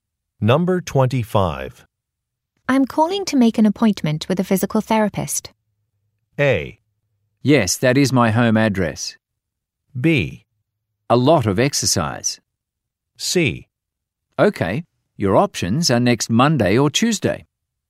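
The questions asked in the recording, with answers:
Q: I'm calling to make an appointment with a physical therapist.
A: C: Okay, your options are next Monday or Tuesday.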